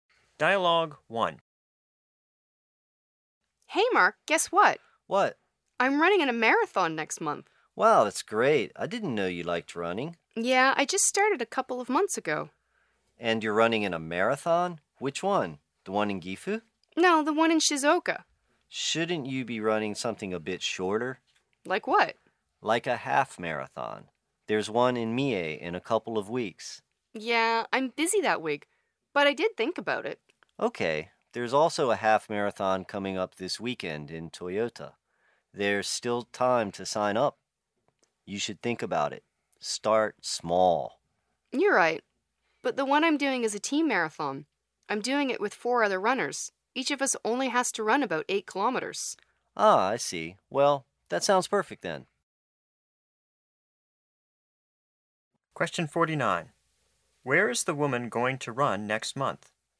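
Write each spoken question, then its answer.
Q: Where is the woman going to run next month?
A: In a team marathon in Shizuoka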